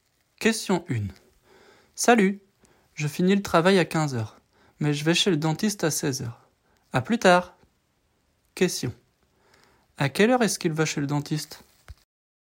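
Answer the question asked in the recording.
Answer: À 16h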